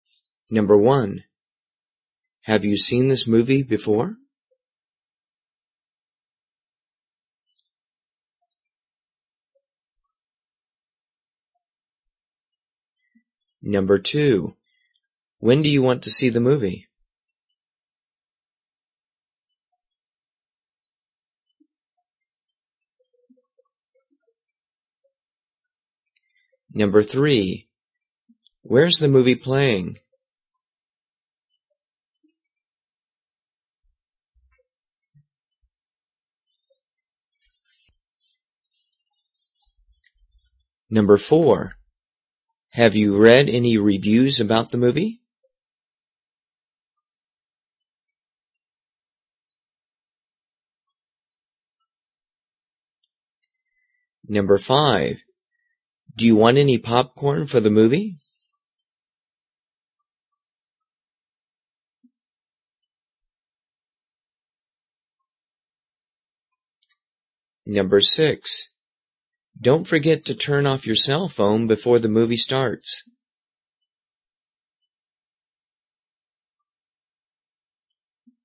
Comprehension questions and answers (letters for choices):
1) Have you _________ this movie ____________?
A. No. I've only seen some of the trailers.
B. Yes. I like it a lot.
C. I really enjoy action movies.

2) _________ do you want to __________________?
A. I want to buy the movie.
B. It's a love story.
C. How about 7:00 O'Clock?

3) _______________ movie ___________?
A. I like to play in movies.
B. Downtown at the mall.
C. The movie is for children.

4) Have you _________________ about the movie?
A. The book about the movie is good.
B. Yes. They want to see the movie.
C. Not yet, but I heard the movie is good.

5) Do you want any _________________?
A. Yes. A drink would be great right now.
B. Don't bother. The line at the concessions is too long.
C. No, I'm not thirsty right now, but maybe later.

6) Don't forget _______________________________.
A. Oh, thanks for reminding me.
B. Thanks. I better check my car lights.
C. Yes. I didn't forget to bring my glasses.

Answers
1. A
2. C
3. B
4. C
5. B
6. A

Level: 中级